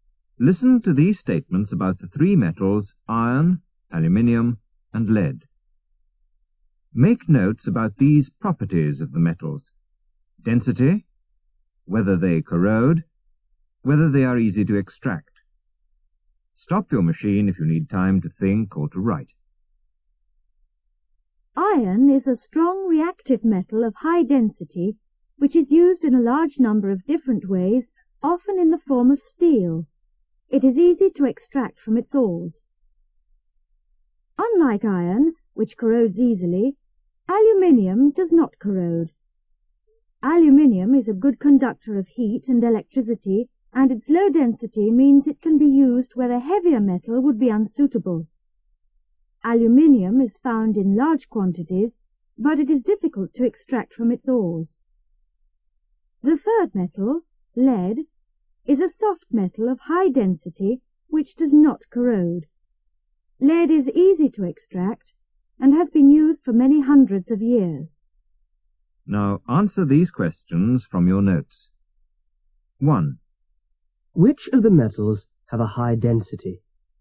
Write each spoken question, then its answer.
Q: Which of the metals have a high density?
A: Iron and lead.